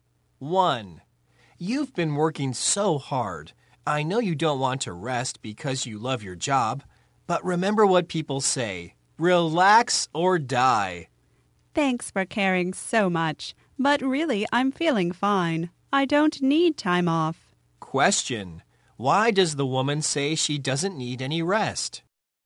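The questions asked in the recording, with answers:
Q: Why does the woman say she doesn't need any rest?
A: She feels fine.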